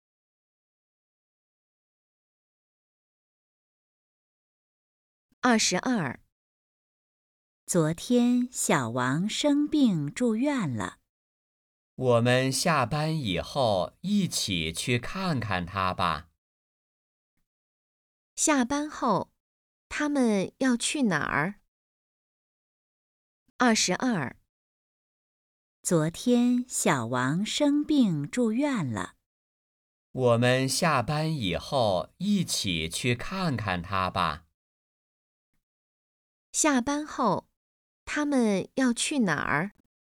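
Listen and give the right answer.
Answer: 去医院看小王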